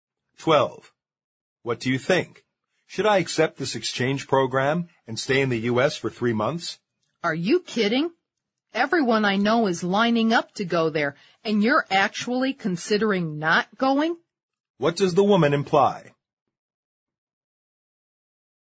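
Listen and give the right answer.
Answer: The man should accept the exchange program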